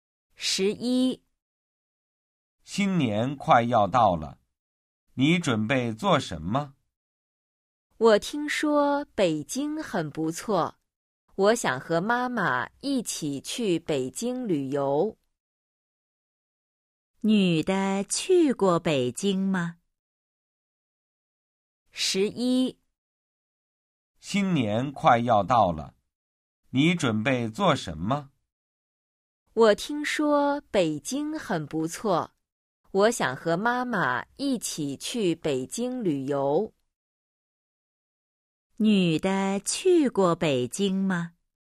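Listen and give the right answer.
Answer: 没去过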